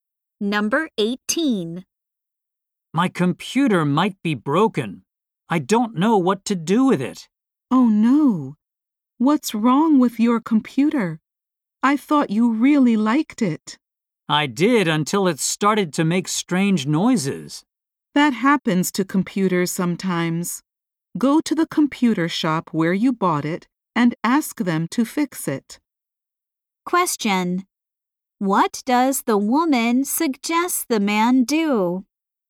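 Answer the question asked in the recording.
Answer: Take it to the shop where he bought it to get it fixed.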